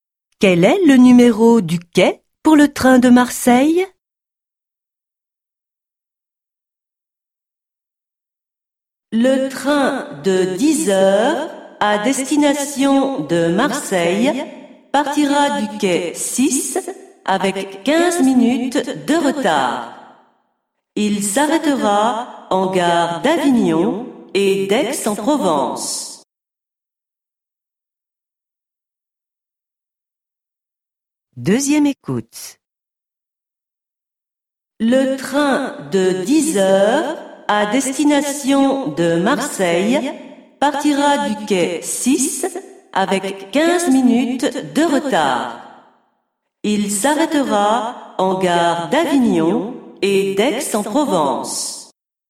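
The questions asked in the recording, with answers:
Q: Quel est le numéro du quai pour le train de Marseille?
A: Quai 6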